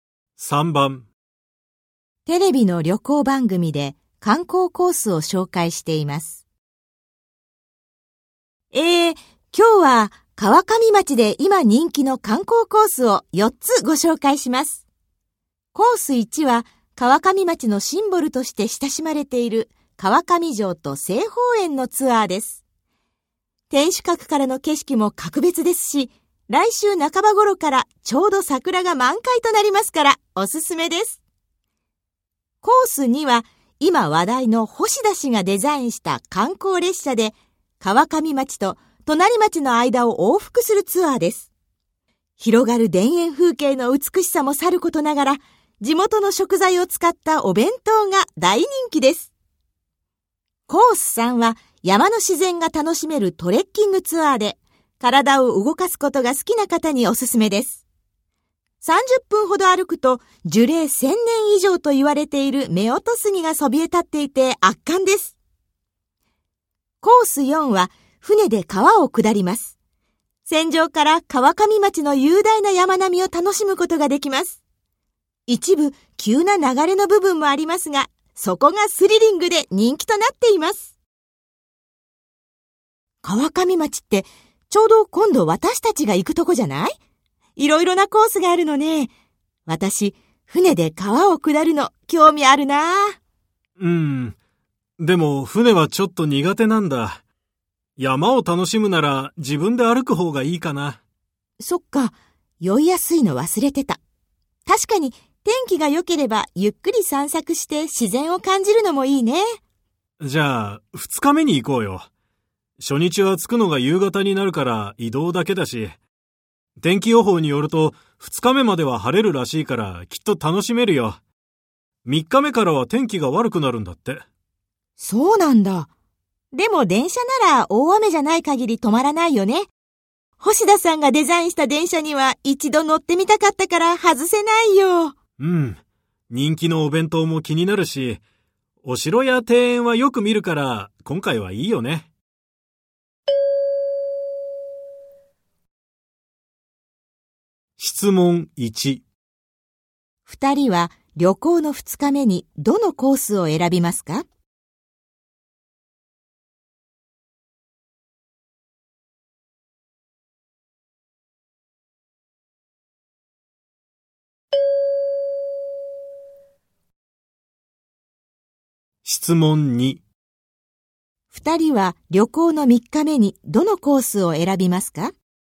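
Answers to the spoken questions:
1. コース3(トレッキングツアー)
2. コース2(観光列車)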